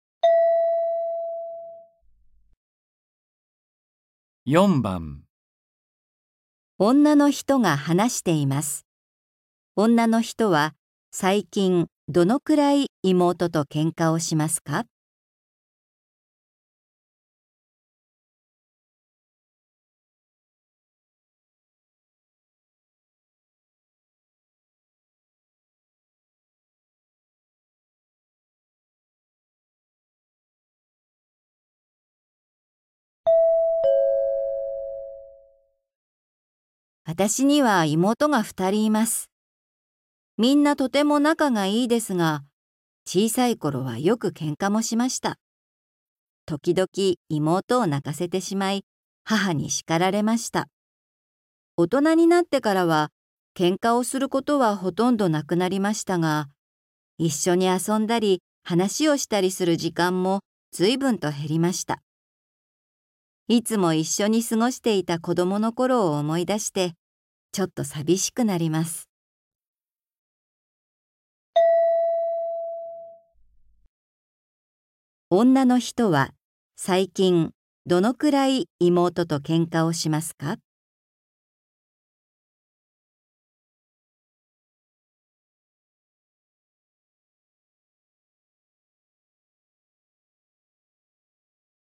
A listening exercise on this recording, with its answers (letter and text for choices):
女の人は、最近どのくらい妹とけんかをしますか。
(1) よくする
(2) ときどきする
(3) ほとんどしない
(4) 全然しない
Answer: (3) ほとんどしない

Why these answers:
大人になってからは、ほとんどけんかをしなくなりました。

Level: 初級